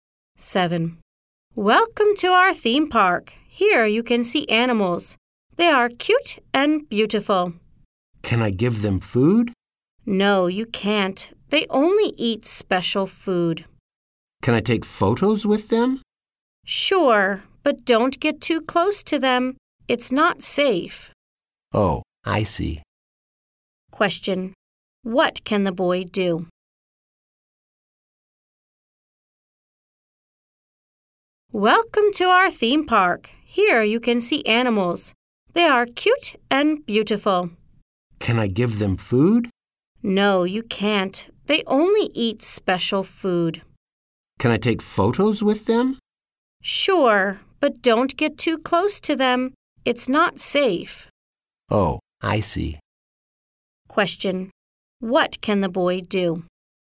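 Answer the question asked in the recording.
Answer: Take photos with the animals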